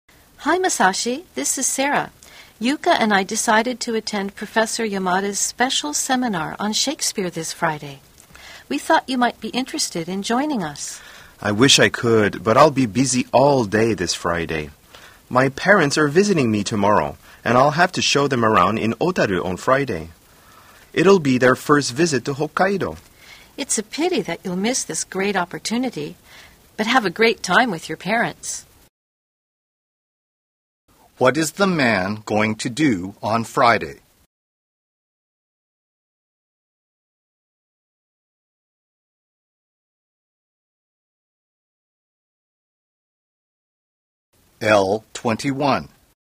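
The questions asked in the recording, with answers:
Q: What is the man going to do on Friday?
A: Show his parents around Otaru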